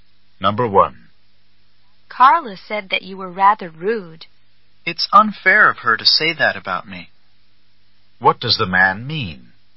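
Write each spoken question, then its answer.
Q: What does the man mean?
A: Carla's remark about him is unfair; he wasn't rude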